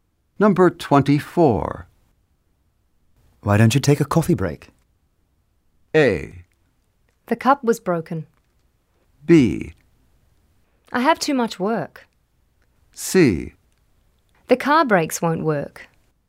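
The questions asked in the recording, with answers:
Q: Why don't you take a coffee break?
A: B: I have too much work.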